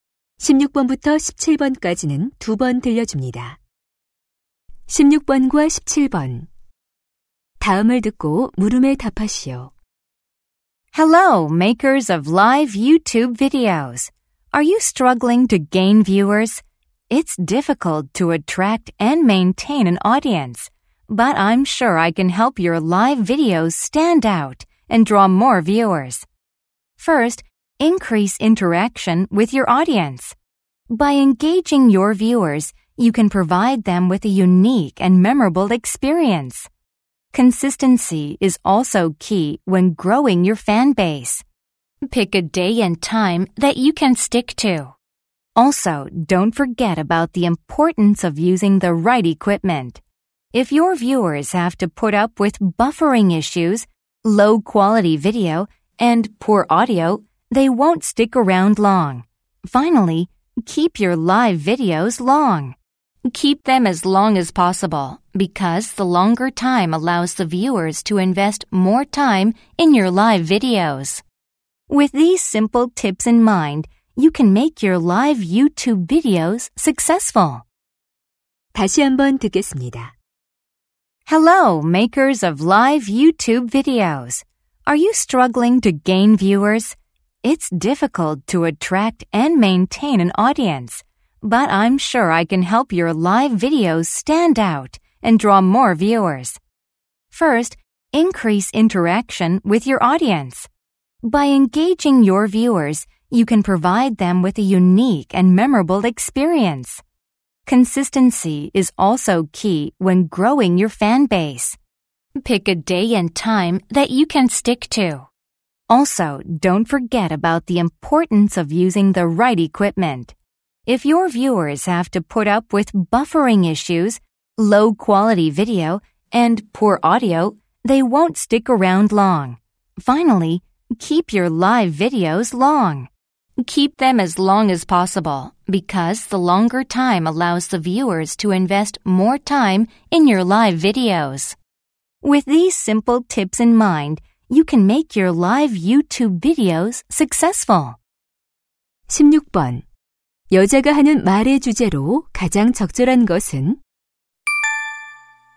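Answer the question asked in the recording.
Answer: 라이브 유튜브 영상으로 시청자를 늘리는 방법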